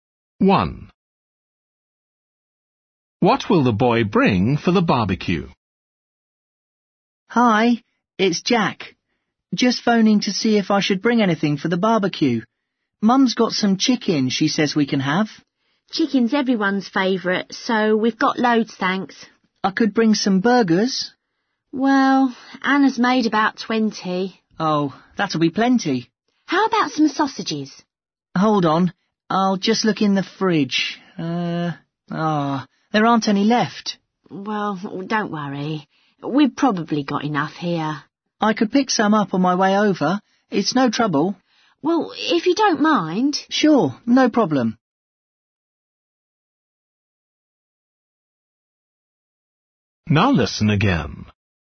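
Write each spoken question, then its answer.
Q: What will the boy bring for the barbecue?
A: sausages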